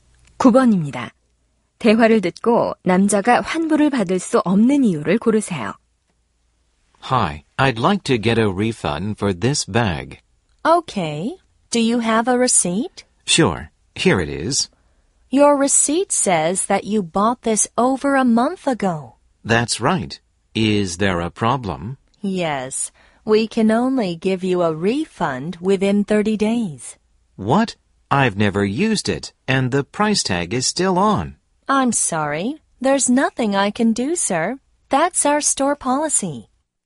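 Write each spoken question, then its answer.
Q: 대화를 듣고 남자가 환불을 받을 수 없는 이유를 고르세요.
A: 구입한 지 30일이 지나서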